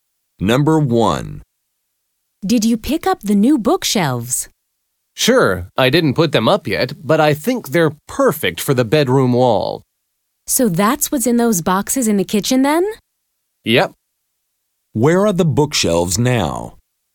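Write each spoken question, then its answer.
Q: Where are the bookshelves now?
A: In boxes in the kitchen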